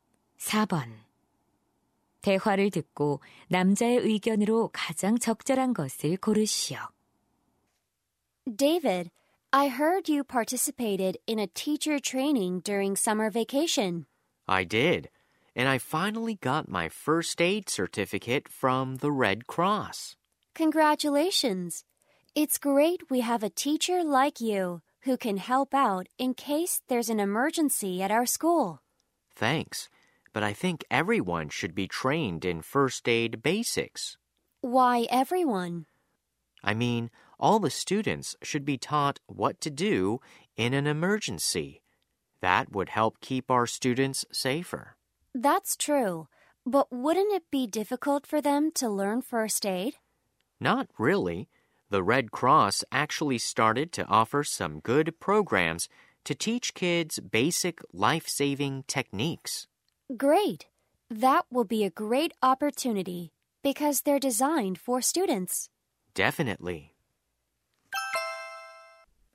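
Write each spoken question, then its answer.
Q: 대화를 듣고 남자의 의견으로 가장 적절한 것을 고르시오.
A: 모든 학생이 응급처치 기초 교육을 받아야 한다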